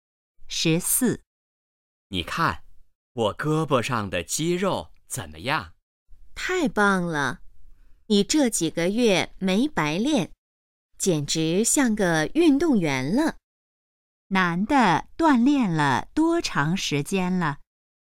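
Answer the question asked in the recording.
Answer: 几个月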